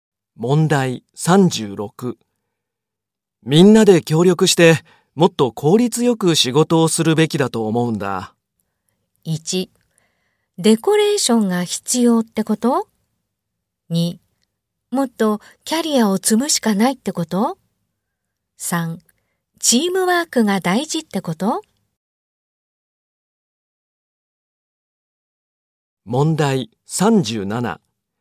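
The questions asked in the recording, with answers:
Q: みんなで協力して、もっと効率よく仕事をするべきだと思うんだ。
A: 3: チームワークが大事ってこと?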